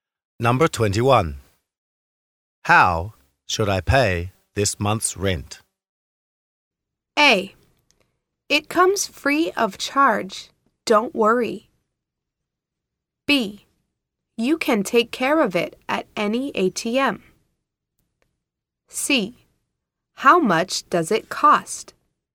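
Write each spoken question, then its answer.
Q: How should I pay this month's rent?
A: B: You can take care of it at any ATM.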